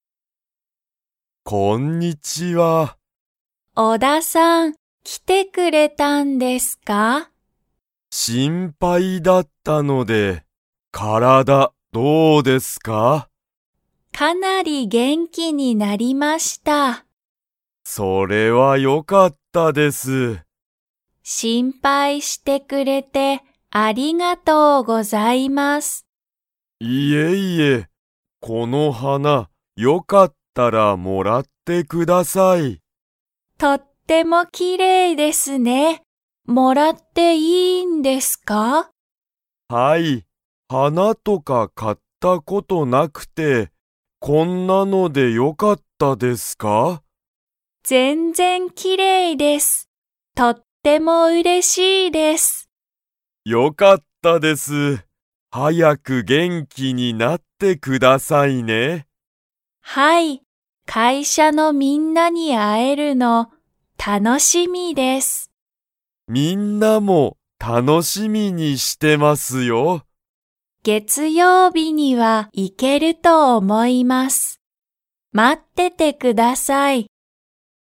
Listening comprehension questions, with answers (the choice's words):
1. 今井いまいさんは、何なにをもらいましたか?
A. お金かね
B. 仕事しごと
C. 花はな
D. ご飯はん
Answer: 花はな

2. 今井いまいさんは、月曜日げつようびには会社かいしゃに 。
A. 行いける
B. 行いけない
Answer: 行いける

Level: Level 3